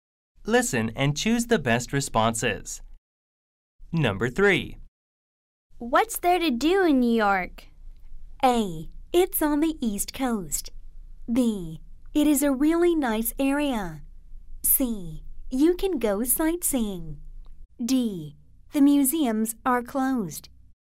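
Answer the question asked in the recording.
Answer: C: You can go sightseeing.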